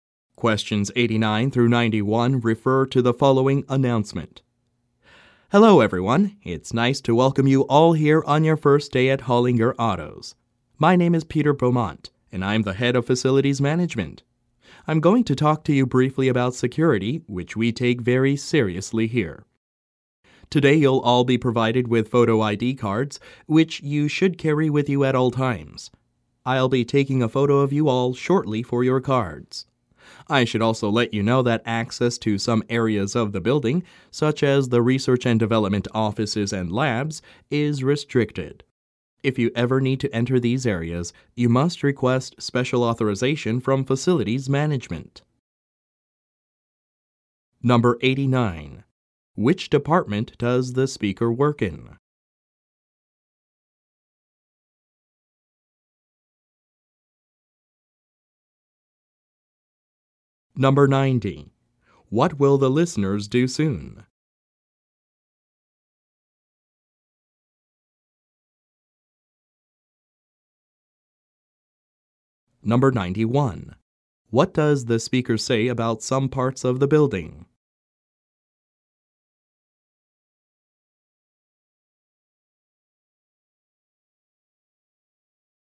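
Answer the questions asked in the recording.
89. Facilities management
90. Have their photos taken for ID cards
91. Access is restricted and requires special authorization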